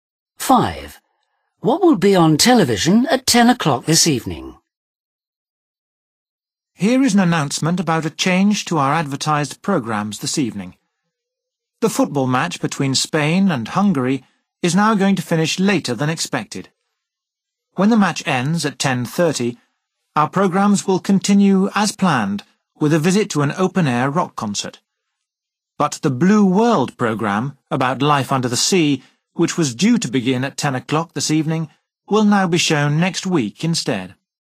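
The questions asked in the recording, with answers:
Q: What will be on television at 10 o'clock this evening?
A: the football match (Spain v Hungary)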